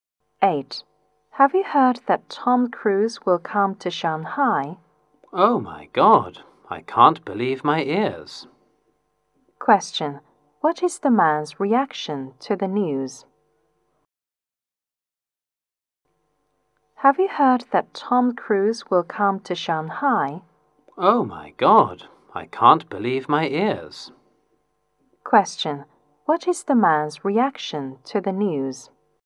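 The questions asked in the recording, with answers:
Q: What is the man's reaction to the news?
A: He is very surprised.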